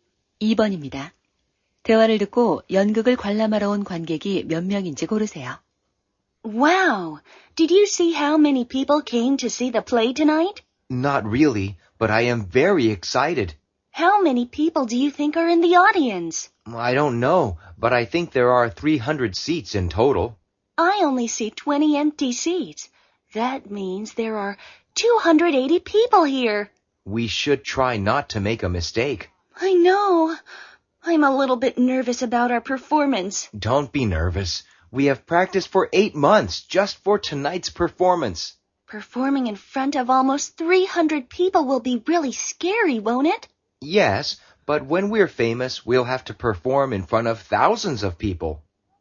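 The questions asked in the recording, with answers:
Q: 대화를 듣고 연극을 관람하러 온 관객이 몇 명인지 고르세요.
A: 280명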